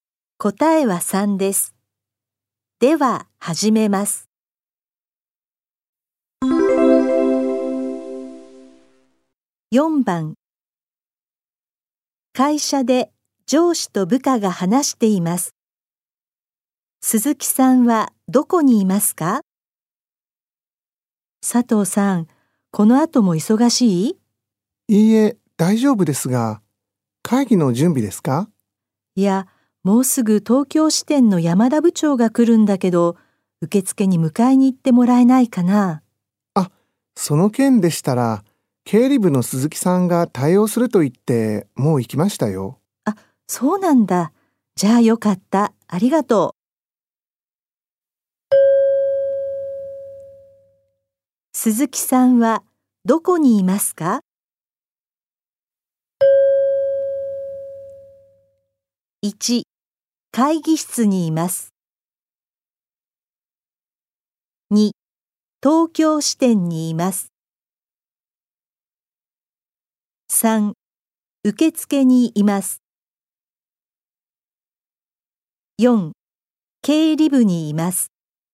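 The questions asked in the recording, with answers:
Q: 鈴木さんはどこにいますか?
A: 3: 受付にいます。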